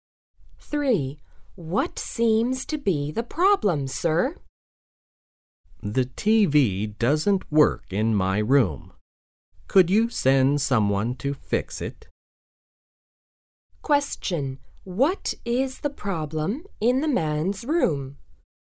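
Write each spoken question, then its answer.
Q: What is the problem in the man's room?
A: The TV doesn't work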